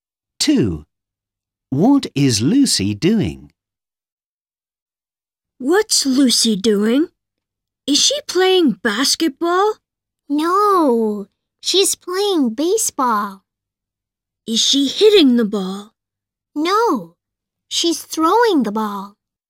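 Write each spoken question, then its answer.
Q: What is Lucy doing?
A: throwing the ball (playing baseball)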